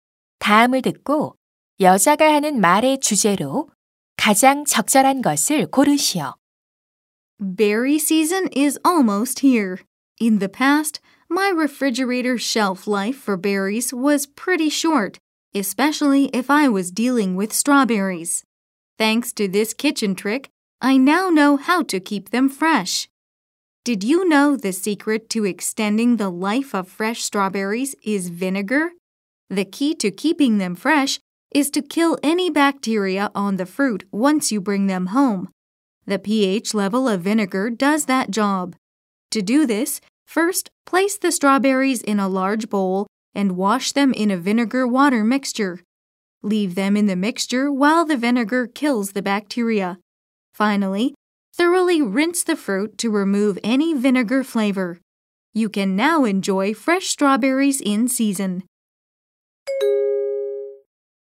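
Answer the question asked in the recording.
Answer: 식초를 이용해 딸기를 신선하게 보관하는 방법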